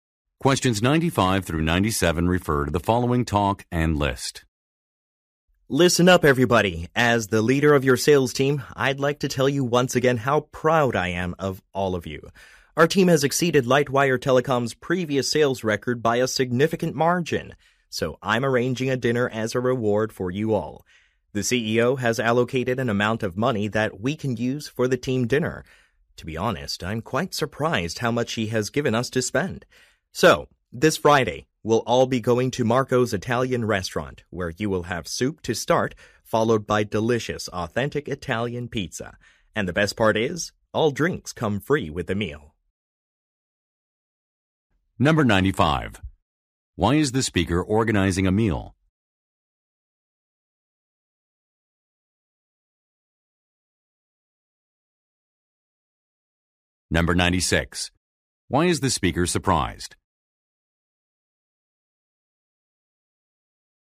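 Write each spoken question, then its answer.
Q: Why is the speaker organizing a meal?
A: To reward the team for breaking the sales record

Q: Why is the speaker surprised?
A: The CEO gave a large budget for the dinner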